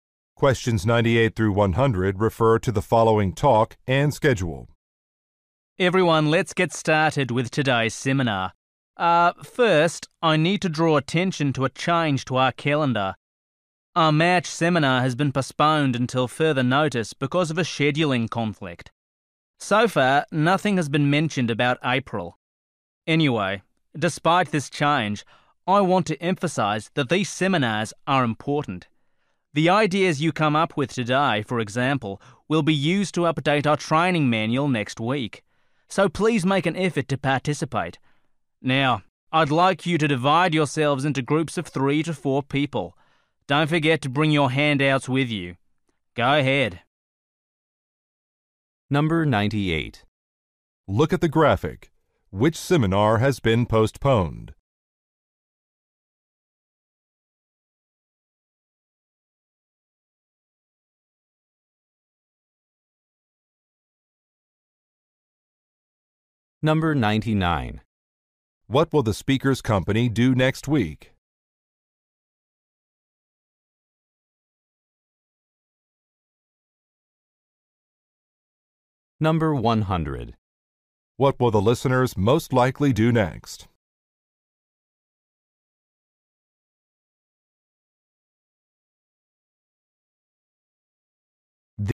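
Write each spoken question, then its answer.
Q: What will the speaker's company do next week?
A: Update its training manual

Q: What will the listeners most likely do next?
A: Form small groups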